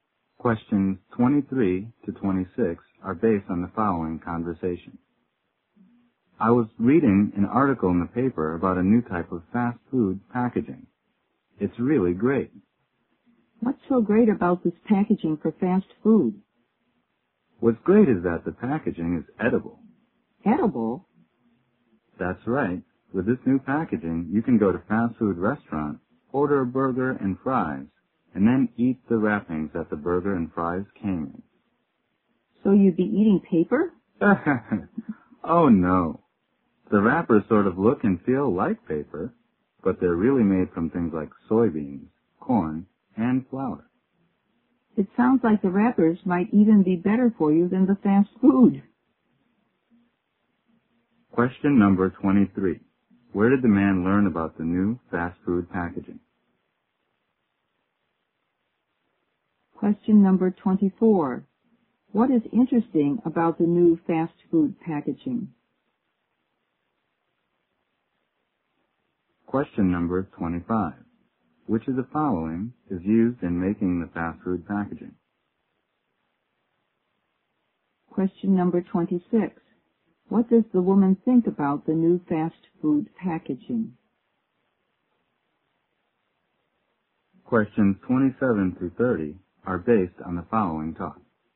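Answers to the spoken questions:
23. In an article in the paper
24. It is edible
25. Soybeans, corn and flour
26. It might be better for you than the fast food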